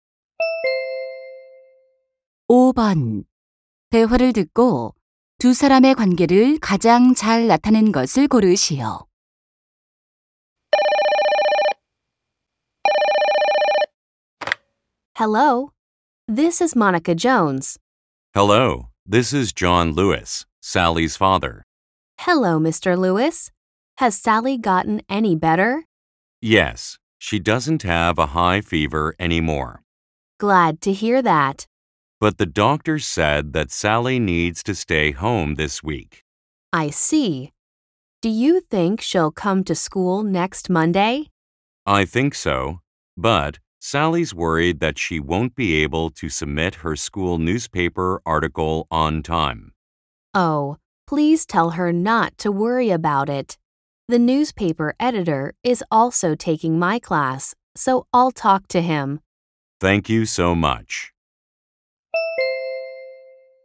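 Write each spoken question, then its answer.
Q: 대화를 듣고 두 사람의 관계를 가장 잘 나타낸 것을 고르시오.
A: 교사 - 학부모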